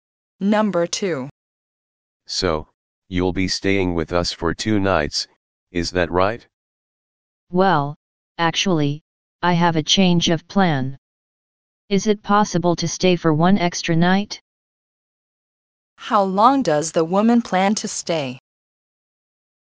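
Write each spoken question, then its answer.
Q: How long does the woman plan to stay?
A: 3 nights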